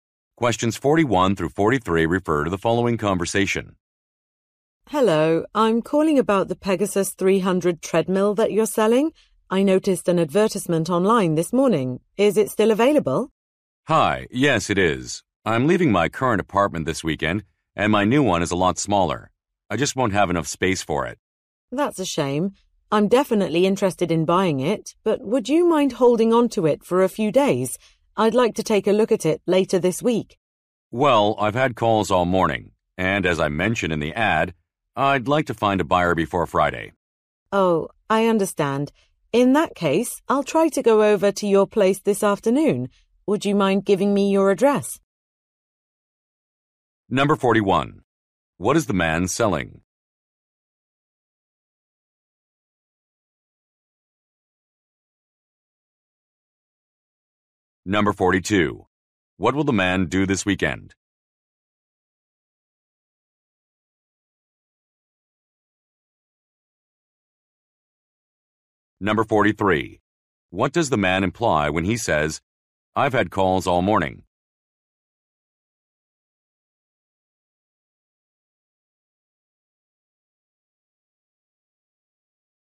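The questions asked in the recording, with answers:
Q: What is the man selling?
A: A treadmill

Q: What will the man do this weekend?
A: Move to a new apartment

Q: What does the man imply when he says, I've had calls all morning?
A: Many people are interested, so he can't hold it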